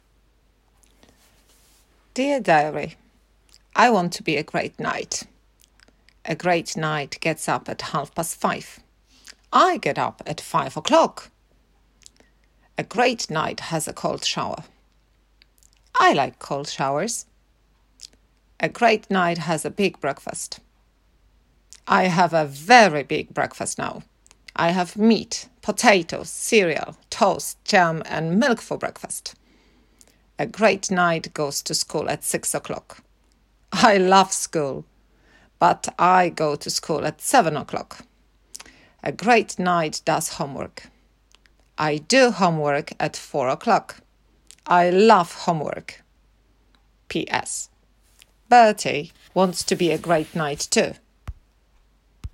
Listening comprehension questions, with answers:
A teraz wróć jeszcze raz do wpisu do pamiętnika Rachel i odpowiedz na moje pytania pełnymi zdaniami (powiedz je na głos):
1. What time does Rachel get up?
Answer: She gets up at five o'clock.

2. Does she like cold showers?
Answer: Yes.

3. Does she have a small breakfast?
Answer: No. She has a big breakfast.

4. What does she have for breakfast?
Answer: She has meat, potatoes, cereal, toast, jam and milk for breakfast.

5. What time does she go to school?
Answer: She goes to school at seven o'clock.

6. Does she love ❤️ school?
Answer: Yes.

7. What time does she do her homework?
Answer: She does her homework at four o'clock.

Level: Klasa 3